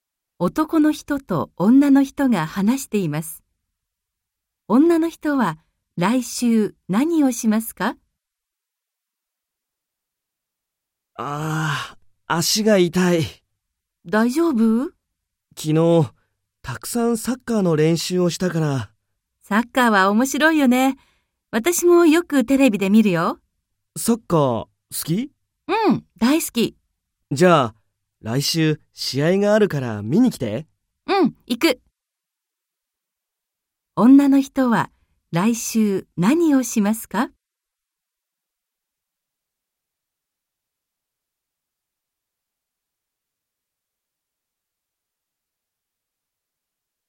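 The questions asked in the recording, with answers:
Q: 女の人は来週何をしますか?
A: サッカーの試合を見に行く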